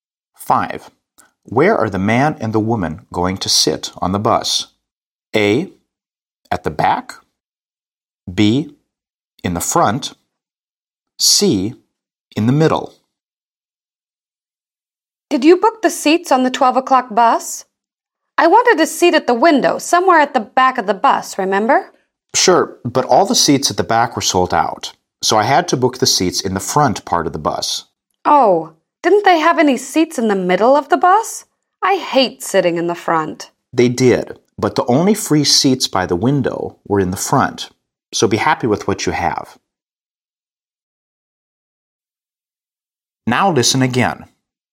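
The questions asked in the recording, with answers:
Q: Where are the man and the woman going to sit on the bus?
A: B: In the front.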